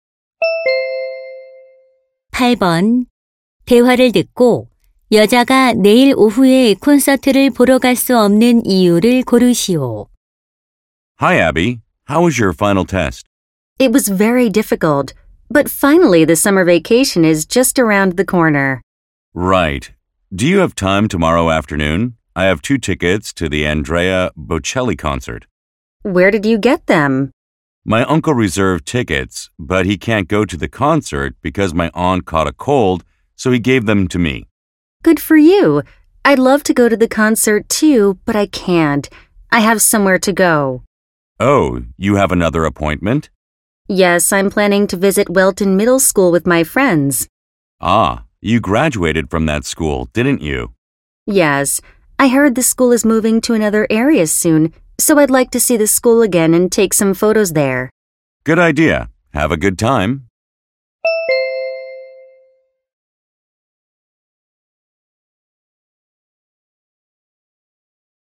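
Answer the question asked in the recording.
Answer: 친구들과 모교인 중학교를 방문하기 위해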